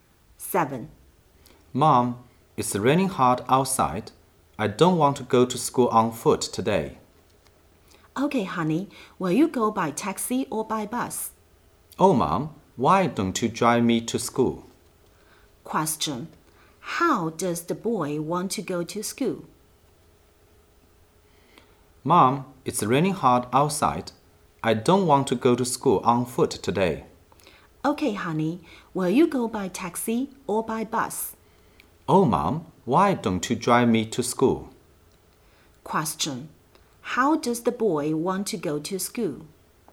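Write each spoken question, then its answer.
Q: How does the boy want to go to school?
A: By car (his mom drives him)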